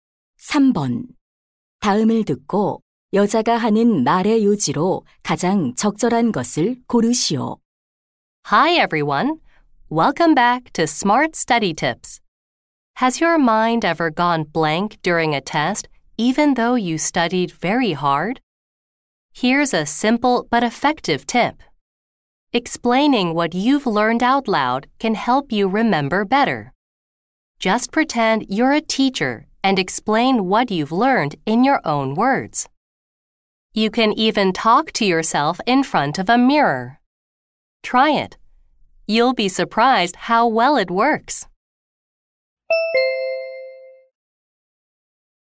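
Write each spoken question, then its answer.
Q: 다음을 듣고 여자가 하는 말의 요지로 가장 적절한 것을 고르시오.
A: 배운 내용을 소리 내어 설명하면 기억에 도움이 된다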